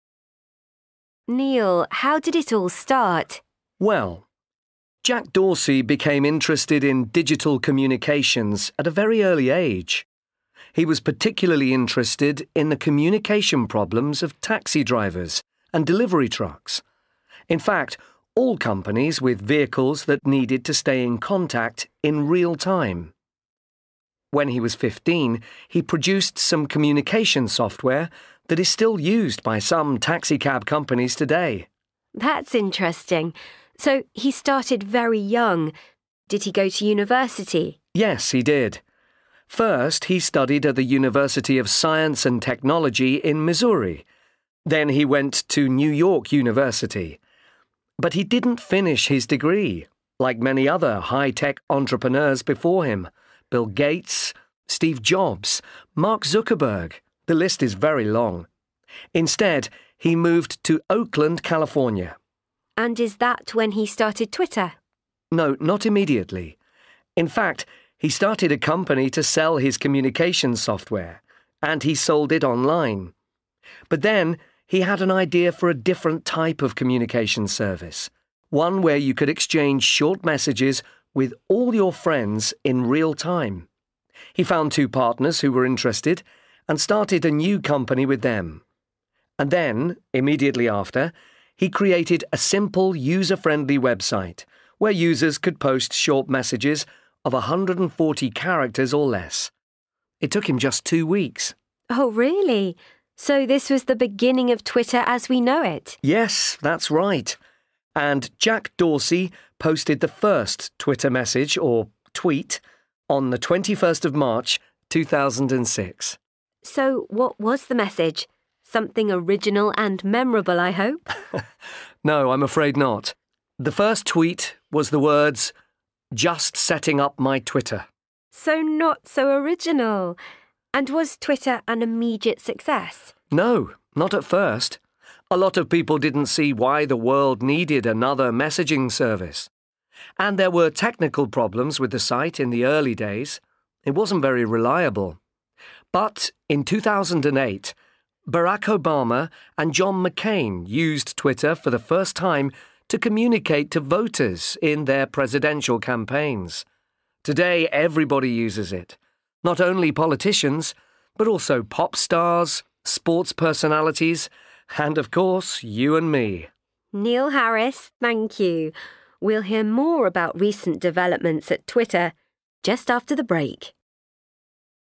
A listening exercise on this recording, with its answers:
1. Listen to the story of Jack Dorsey and Twitter and put the events in the right order.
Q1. People don't understand why Twitter is necessary.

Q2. Starts a new company with two other people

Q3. Goes to New York University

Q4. Doesn't finish his studies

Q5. Studies in Missouri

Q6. Sells software online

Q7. Moves to California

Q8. Creates a website in two weeks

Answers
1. 9
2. 7
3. 3
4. 4
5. 2
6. 6
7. 5
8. 8

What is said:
Presenter Neil, how did it all start?
Neil Well, Jack Dorsey became interested in digital communications at a very early age. He was particularly interested in the communication problems of taxi drivers and delivery trucks. In fact, all companies with vehicles that needed to stay in contact in real time. When he was 15, he produced some communication software that is still used by some taxicab companies today.
Presenter That's interesting. So he started very young. Did he go to university?
Neil Yes, he did. First he studied at the University of Science and Technology in Missouri, then he went to New York University. But he didn't finish his degree, like many other high-tech entrepreneurs before him – Bill Gates, Steve Jobs, Mark Zuckerberg. The list is very long. Instead, he moved to Oakland, California.
Presenter And is that when he started Twitter?
Neil No, not immediately. In fact, he started a company to sell his communication software and he sold it online. But then he had an idea for a different type of communication service – one where you could exchange short messages with all your friends in real time. He found two partners who were interested, and started a new company with them. And then, immediately after, he created a simple, user-friendly website where users could post short messages of 140 characters or less. It took him just two weeks!
Presenter Oh really? So this was the beginning of Twitter as we know it?
Neil Yes, that's right. And Jack Dorsey posted the first Twitter message, or 'Tweet', on the 21st March 2006.
Presenter So what was the message? Something original and memorable, I hope?
Neil No, I'm afraid not. The first tweet was the words 'Just setting up my twttr.'
Presenter So not so original! And was Twitter an immediate success?
Neil No, not at first. A lot of people didn't see why the world needed another messaging service. And there were technical problems with the site in the early days – it wasn't very reliable. But in 2008, Barack Obama and John McCain used Twitter for the first time to communicate to voters in their Presidential campaigns. Today, everybody uses it: not only politicians, but also pop stars, sports personalities ... and of course, you and me.
Presenter Neil Harris – thank you. We'll hear more about recent developments at Twitter ... just after the break.